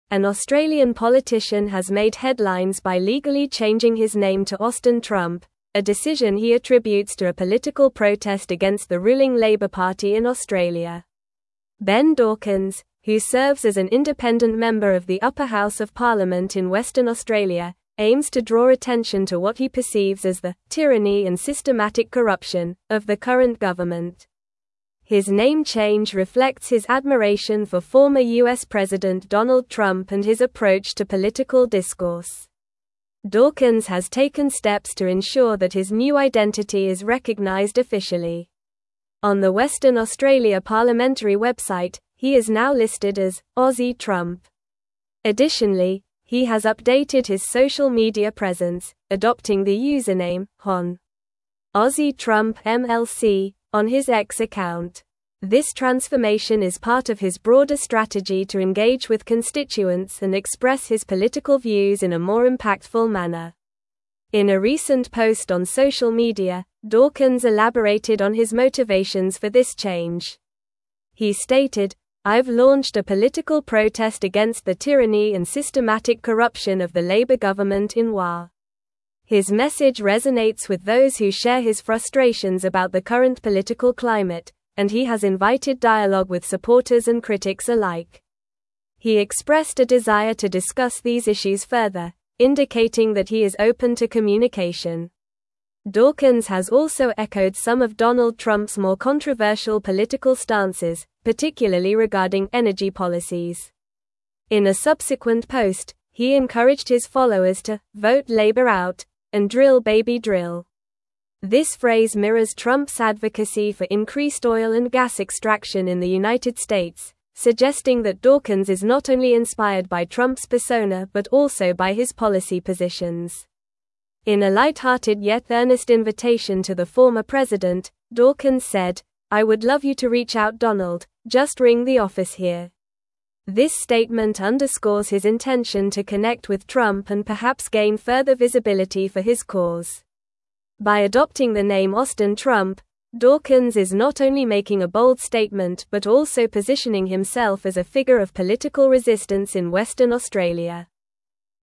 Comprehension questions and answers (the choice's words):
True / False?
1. He has rejected Donald Trump's invitation to reach out to him, indicating a lack of desire for connection and visibility for his cause.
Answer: False

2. Dawkins has updated his social media username to "Hon. Aussie Trump MLC" on his X account.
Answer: True

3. Dawkins's name change is intended to draw attention to what he views as tyranny and systematic corruption in the Labor Party.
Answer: True

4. An Australian politician has legally changed his name to Austin Trump as a fashion statement.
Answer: False

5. Ben Dawkins is an independent member of the upper house of parliament in Western Australia.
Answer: True

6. Dawkins has echoed Donald Trump's controversial energy policies, encouraging his followers to "Vote Labor Out! & Drill Baby Drill!"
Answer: True

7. He has expressed a reluctance to engage in dialogue with both supporters and critics regarding his political views.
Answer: False

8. He is now unofficially listed as "Aussie Trump" on the Western Australia parliamentary website.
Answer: False

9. What name did the Australian politician legally change to?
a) Austin Trump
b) Ben Dawkins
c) Donald Trump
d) Aussie Dawkins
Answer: Austin Trump

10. What is Ben Dawkins' political affiliation?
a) Labor Party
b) Liberal Party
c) Independent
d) Green Party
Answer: Independent

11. What does Dawkins attribute his name change to?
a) Personal preference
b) Political protest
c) A bet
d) A family tradition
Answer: Political protest

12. How is Dawkins officially recognized on the Western Australia parliamentary website?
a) Ben Dawkins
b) Austin Dawkins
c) Hon. Ben Trump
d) Aussie Trump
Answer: Aussie Trump

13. What phrase did Dawkins use to encourage his followers regarding political action?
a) Make Australia Great Again!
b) Change the Government!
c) Stand Up for Australia!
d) Vote Labor Out! & Drill Baby Drill!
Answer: Vote Labor Out! & Drill Baby Drill!

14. Which former U.S. President does Dawkins express admiration for?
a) Donald Trump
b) Barack Obama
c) George W. Bush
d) Joe Biden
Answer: Donald Trump

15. What issue has Dawkins echoed from Donald Trump's political stances?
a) Immigration reform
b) Energy policies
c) Healthcare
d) Education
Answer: Energy policies

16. What does Dawkins invite Donald Trump to do in his light-hearted statement?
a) Visit Australia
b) Join him in a protest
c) Reach out and call his office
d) Endorse his campaign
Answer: Reach out and call his office

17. An Australian (1)______ has made headlines by legally changing his name to Austin (2)______, a (3)______ he attributes to a political protest against the ruling Labor Party in Australia.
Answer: politician

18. An Australian (1)______ has made headlines by legally changing his name to Austin (2)______, a (3)______ he attributes to a political protest against the ruling Labor Party in Australia.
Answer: Trump

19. An Australian (1)______ has made headlines by legally changing his name to Austin (2)______, a (3)______ he attributes to a political protest against the ruling Labor Party in Australia.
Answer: decision

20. Dawkins has taken steps to (4)______ that his new identity is recognized officially.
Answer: ensure

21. Additionally, he has updated his social media presence, adopting the username "Hon. Aussie Trump MLC" on his X (5)______.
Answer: account

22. He (6)______, "I've launched a political protest against the (7)______ and (8)______ corruption of the Labor government in WA."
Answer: stated

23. He (6)______, "I've launched a political protest against the (7)______ and (8)______ corruption of the Labor government in WA."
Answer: tyranny

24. He (6)______, "I've launched a political protest against the (7)______ and (8)______ corruption of the Labor government in WA."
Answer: systematic

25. His message (9)______ with those who share his frustrations about the current political climate, and he has invited dialogue with supporters and critics alike.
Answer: resonates

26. Dawkins has also echoed some of Donald Trump's more controversial political stances, particularly regarding energy (10)______.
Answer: policies

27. In a subsequent post, he (11)______ his followers to "Vote Labor Out! & Drill Baby Drill!"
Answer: encouraged

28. This (12)______ mirrors Trump's advocacy for increased oil and gas extraction in the United (13)______, suggesting that Dawkins is not only inspired by Trump's persona but also by his policy positions.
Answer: phrase

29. This (12)______ mirrors Trump's advocacy for increased oil and gas extraction in the United (13)______, suggesting that Dawkins is not only inspired by Trump's persona but also by his policy positions.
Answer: States

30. In a light-hearted yet earnest invitation to the former (14)______, Dawkins said, "I would love you to (15)______ out Donald, just ring the office here."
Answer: president

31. In a light-hearted yet earnest invitation to the former (14)______, Dawkins said, "I would love you to (15)______ out Donald, just ring the office here."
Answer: reach

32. This statement underscores his intention to connect with Trump and perhaps gain further visibility for his (16)______.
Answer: cause

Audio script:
An Australian politician has made headlines by legally changing his name to Austin Trump, a decision he attributes to a political protest against the ruling Labor Party in Australia. Ben Dawkins, who serves as an independent member of the upper house of parliament in Western Australia, aims to draw attention to what he perceives as the "tyranny and systematic corruption" of the current government. His name change reflects his admiration for former U.S. President Donald Trump and his approach to political discourse.
Dawkins has taken steps to ensure that his new identity is recognized officially. On the Western Australia parliamentary website, he is now listed as "Aussie Trump." Additionally, he has updated his social media presence, adopting the username "Hon. Aussie Trump MLC" on his X account. This transformation is part of his broader strategy to engage with constituents and express his political views in a more impactful manner.
In a recent post on social media, Dawkins elaborated on his motivations for this change. He stated, "I've launched a political protest against the tyranny and systematic corruption of the Labor government in WA." His message resonates with those who share his frustrations about the current political climate, and he has invited dialogue with supporters and critics alike. He expressed a desire to discuss these issues further, indicating that he is open to communication.
Dawkins has also echoed some of Donald Trump's more controversial political stances, particularly regarding energy policies. In a subsequent post, he encouraged his followers to "Vote Labor Out! & Drill Baby Drill!" This phrase mirrors Trump's advocacy for increased oil and gas extraction in the United States, suggesting that Dawkins is not only inspired by Trump's persona but also by his policy positions.
In a light-hearted yet earnest invitation to the former president, Dawkins said, "I would love you to reach out Donald, just ring the office here." This statement underscores his intention to connect with Trump and perhaps gain further visibility for his cause. By adopting the name Austin Trump, Dawkins is not only making a bold statement but also positioning himself as a figure of political resistance in Western Australia.

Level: Level 4